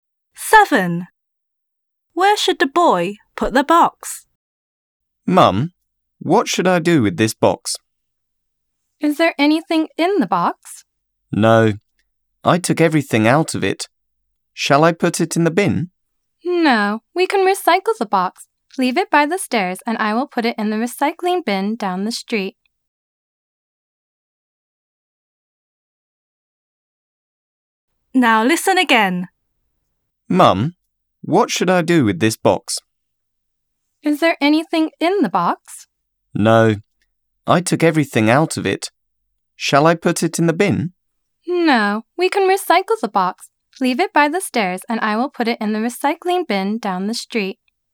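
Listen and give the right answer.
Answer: By the stairs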